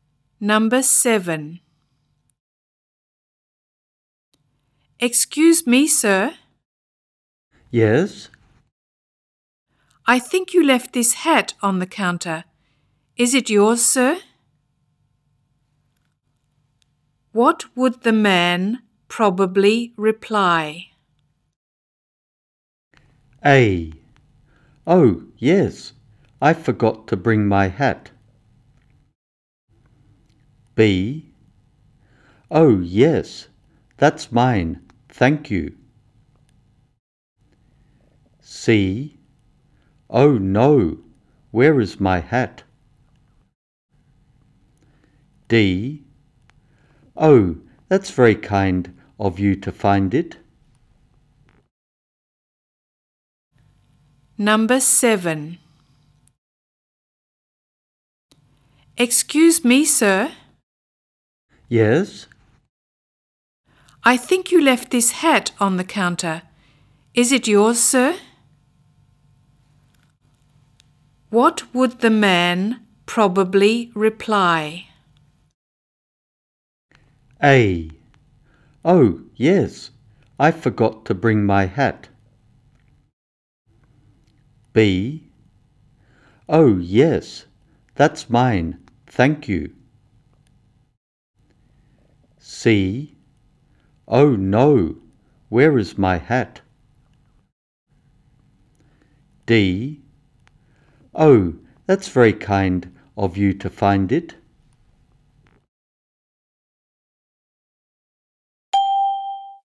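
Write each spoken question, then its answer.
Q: What would the man probably reply?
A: B: Oh, yes, that's mine, thank you.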